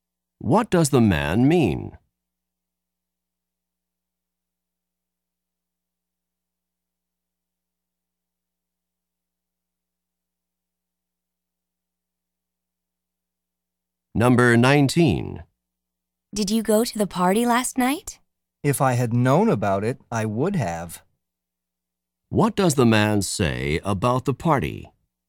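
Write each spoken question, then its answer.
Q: What does the man say about the party?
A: He didn't know about it, so he didn't go.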